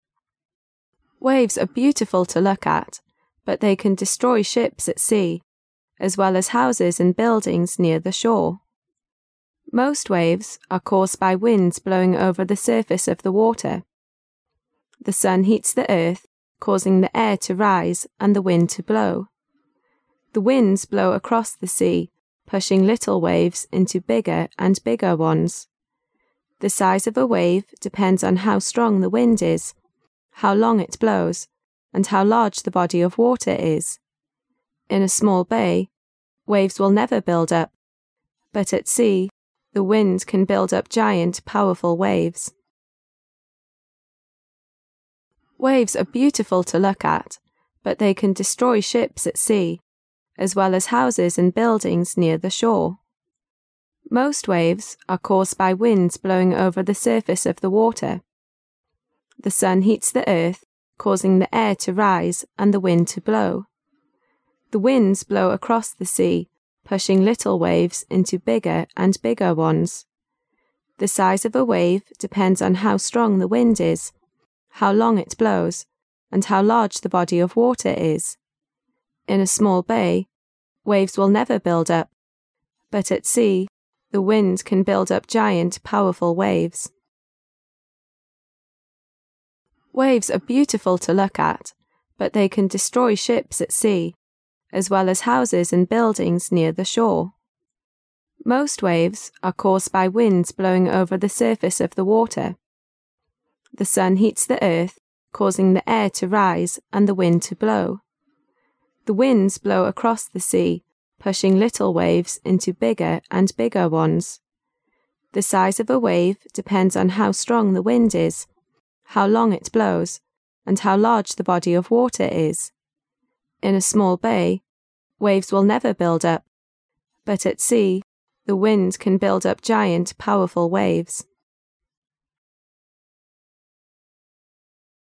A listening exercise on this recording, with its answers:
During the second reading, you are required to put the missing words or phrases on the Answer Sheet in order of the numbered blanks according to what you hear.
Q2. Most waves are caused by winds blowing over the 2 of the water.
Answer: surface

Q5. But at sea, the wind can build up 5 powerful waves.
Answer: giant

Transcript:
Waves are beautiful to look at, but they can destroy ships at sea, 1 houses and buildings near the shore.
[解析] 11-15 Waves are beautiful to look at, but they can destroy ships at sea, as well as houses and buildings near the shore. Most waves are caused by winds blowing over the surface of the water. The sun heats the earth, causing the air to rise and the wind to blow. The winds blow across the sea, pushing lime waves into bigger and bigger ones. The size of a wave depends on how strong the wind is, how long it blows, and how large the body of water is. In a small bay, waves will never build up. But at sea, the wind can build up giant powerful waves.